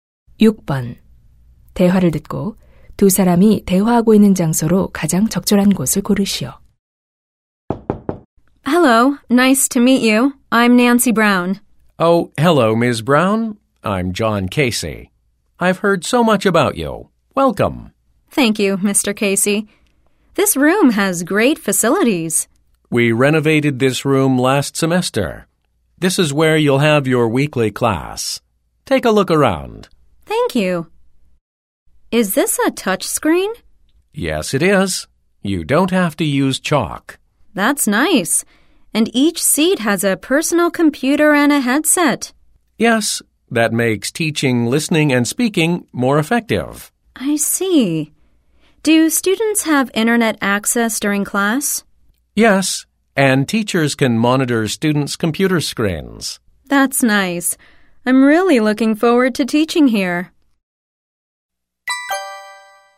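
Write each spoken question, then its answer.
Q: 대화를 듣고 두 사람이 대화하고 있는 장소로 가장 적절한 곳을 고르시오.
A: 어학 실습실(컴퓨터 강의실)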